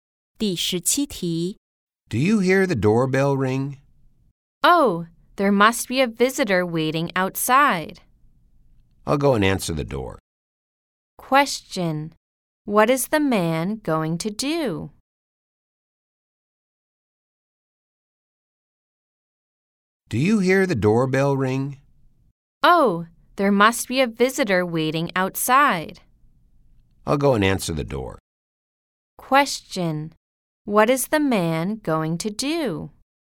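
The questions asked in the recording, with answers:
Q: Question: What is the man going to do?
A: Answer the door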